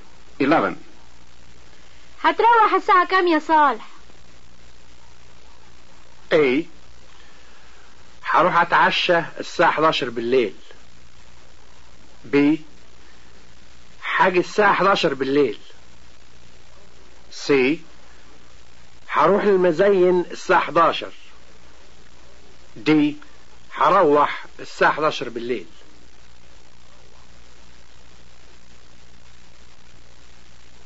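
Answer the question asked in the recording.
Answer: D: هروح الساعة 11 بالليل.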